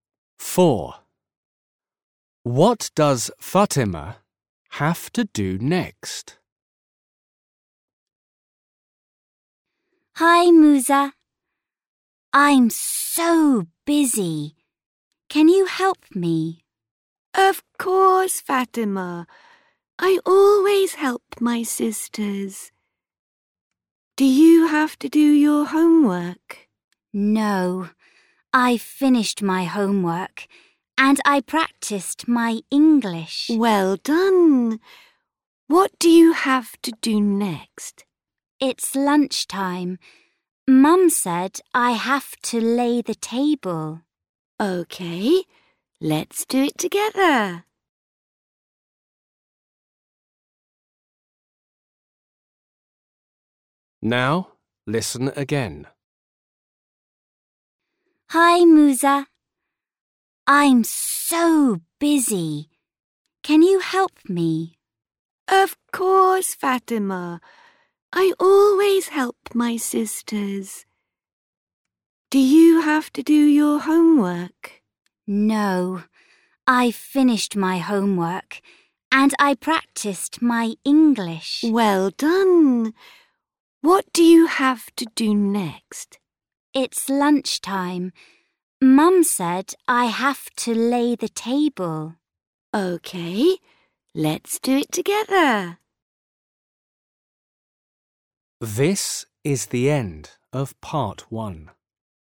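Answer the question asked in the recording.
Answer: lay the table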